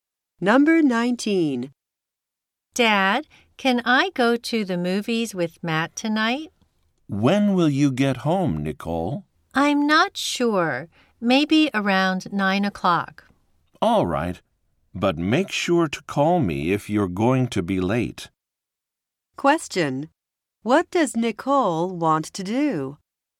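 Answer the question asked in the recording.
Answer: Go to the movies with Matt tonight.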